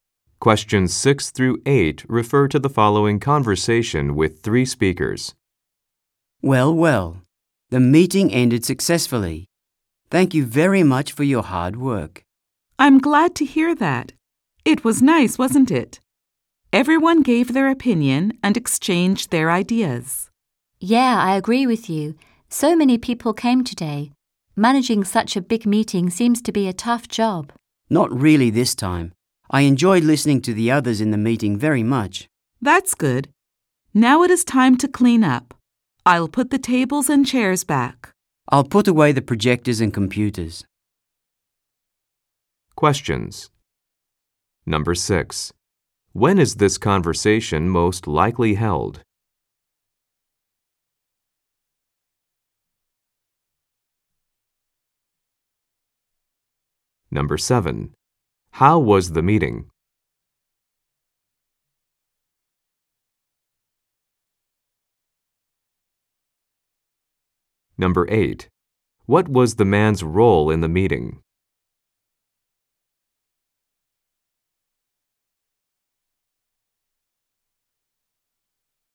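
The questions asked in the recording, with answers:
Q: When is this conversation most likely held?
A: Right after a meeting

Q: How was the meeting?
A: It was successful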